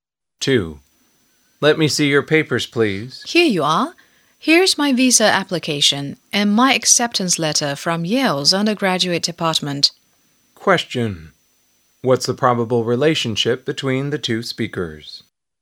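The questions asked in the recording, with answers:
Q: What's the probable relationship between the two speakers?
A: Visa officer and applicant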